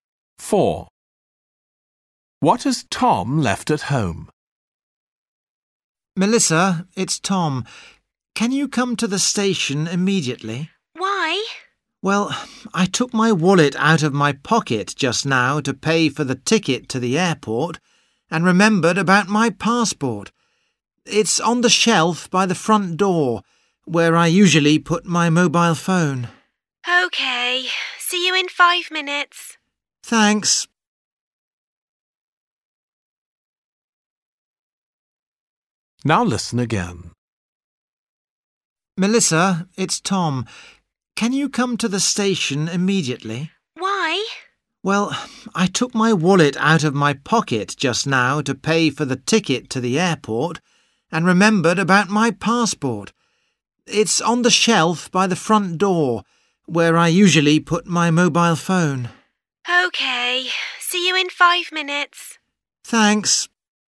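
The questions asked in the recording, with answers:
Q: What has Tom left at home?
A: His passport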